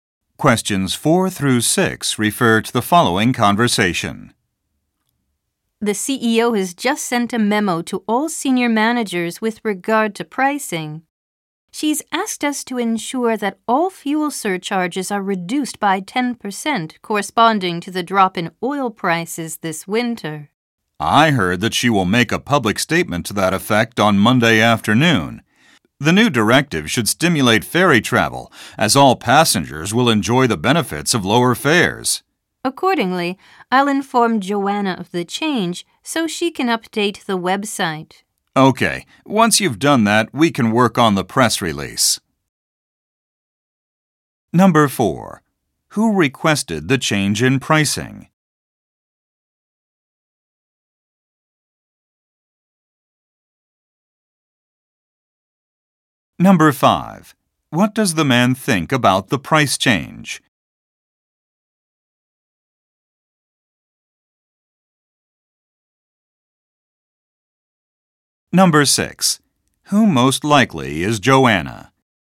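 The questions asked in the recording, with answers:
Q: Who requested the change in pricing?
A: The CEO

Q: What does the man think about the price change?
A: It should stimulate ferry travel

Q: Who most likely is Joanna?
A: The person who updates the website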